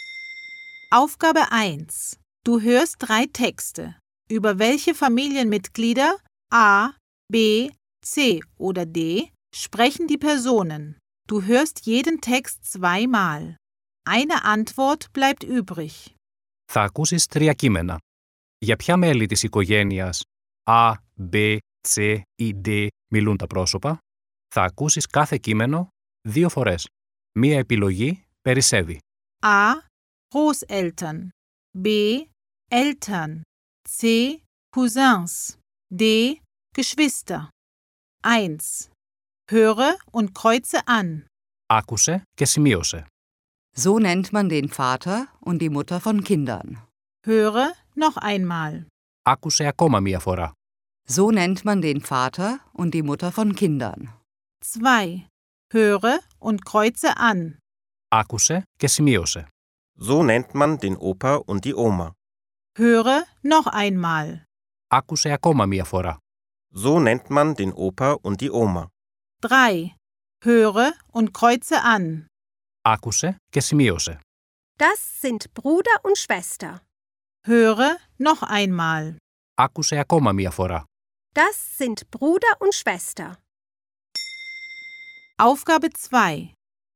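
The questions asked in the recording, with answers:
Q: Über welche Familienmitglieder A, B, C oder D sprechen die Personen?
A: B: Eltern

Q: Über welche Familienmitglieder A, B, C oder D sprechen die Personen?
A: A: Großeltern

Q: Über welche Familienmitglieder A, B, C oder D sprechen die Personen?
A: D: Geschwister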